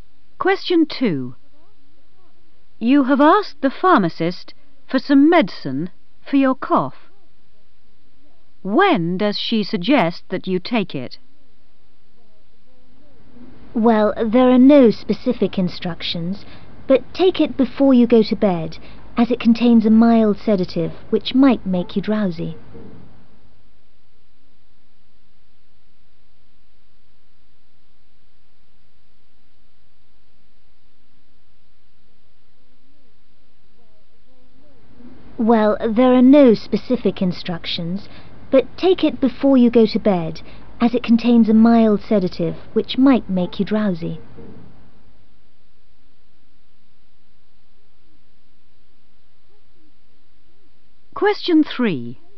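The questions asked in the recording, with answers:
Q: When does she suggest that you take it?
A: before you go to bed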